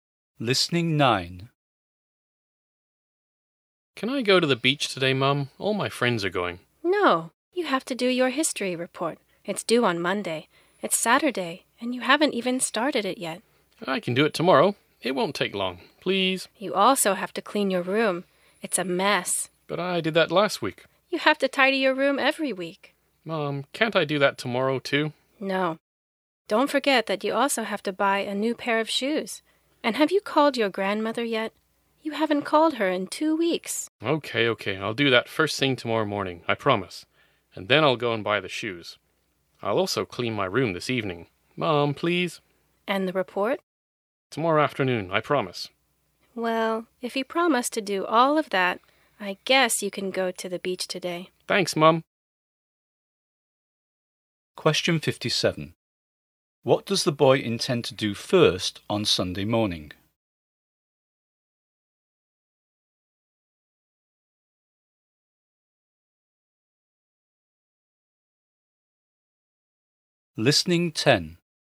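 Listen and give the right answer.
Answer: Call his grandmother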